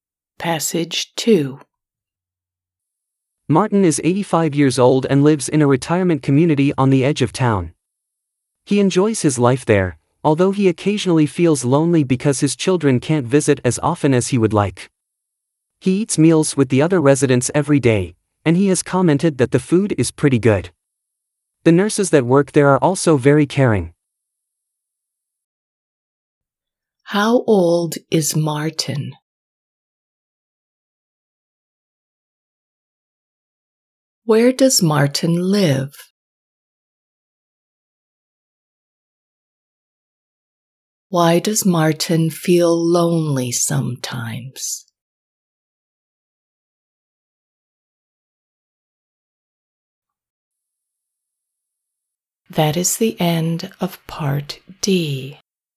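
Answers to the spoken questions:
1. 85
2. In a retirement community on the edge of town
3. His children can't visit as often as he would like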